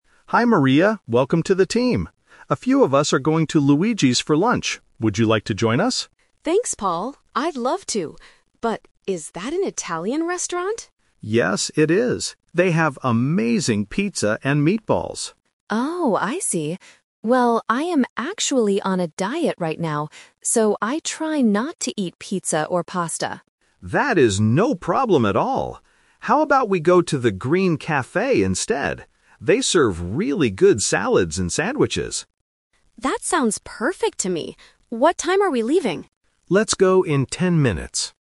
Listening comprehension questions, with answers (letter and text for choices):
Listen to the conversation and choose the correct answer (A, B, or C).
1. Where did Paul originally want to go for lunch?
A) The Green Café.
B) An Italian restaurant.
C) A sandwich shop.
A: B) An Italian restaurant.

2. Why doesn't Maria want to eat pizza?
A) She is on a diet.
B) She doesn't like Italian food.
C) She brought her own lunch to work.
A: A) She is on a diet.

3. Where are they going to eat finally?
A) At Luigi's.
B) At the Green Café.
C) At the company cafeteria.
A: B) At the Green Café.

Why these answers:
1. Paul says they are going to "Luigi's" and confirms it is an Italian restaurant. Option A is the Trap (it is the final place they choose, not the original plan). Option C is a detail mentioned later.
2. Maria clearly says, "I am actually on a diet right now." Option B is a Trap because she asks if it's an Italian restaurant, but she doesn't say she dislikes the food. Option C is a logical reason but is never mentioned in the audio.
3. This is the Final Result (The Twist). Because Maria is on a diet, Paul changes the plan and suggests the Green Café, and Maria agrees ("That sounds perfect"). Option A was the rejected plan. Option C is not mentioned.

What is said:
Paul: Hi Maria, welcome to the team! A few of us are going to Luigi's for lunch. Would you like to join us?
Maria: Thanks, Paul! I'd love to. But... is that an Italian restaurant?
Paul: Yes, it is. They have amazing pizza and meatballs.
Maria: Oh, I see. Well, I am actually on a diet right now, so I try not to eat pizza or pasta.
Paul: That is no problem at all! How about we go to the Green Café instead? They serve really good salads and sandwiches.
Maria: That sounds perfect to me. What time are we leaving?